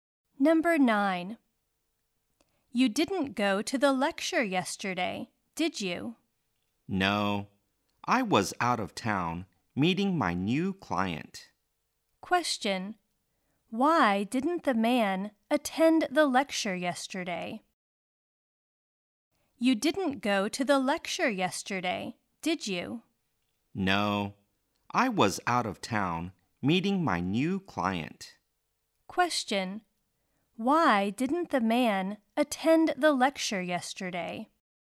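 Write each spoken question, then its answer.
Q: Why didn't the man attend the lecture yesterday?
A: He was out of town meeting his new client.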